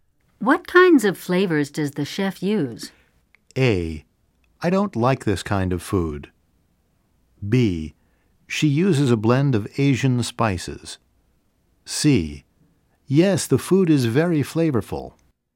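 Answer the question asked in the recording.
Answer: B: She uses a blend of Asian spices.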